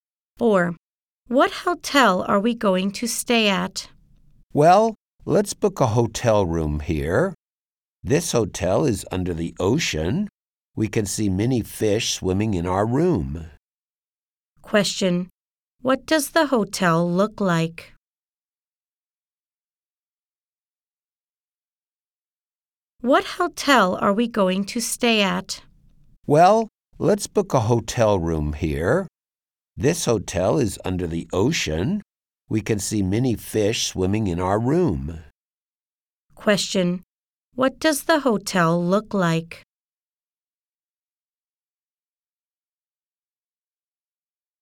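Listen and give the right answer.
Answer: It's under the ocean, with fish swimming outside the rooms.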